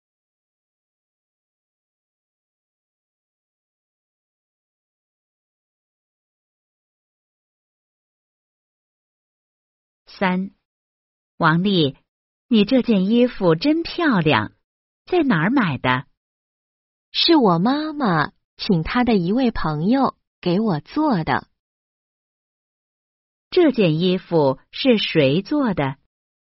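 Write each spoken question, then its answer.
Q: 这件衣服是谁做的?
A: 妈妈的一位朋友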